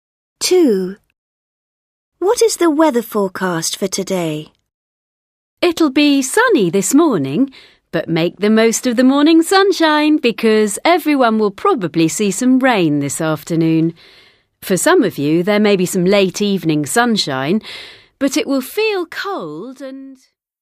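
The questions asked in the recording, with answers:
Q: What is the weather forecast for today?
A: Sunny in the morning, rain in the afternoon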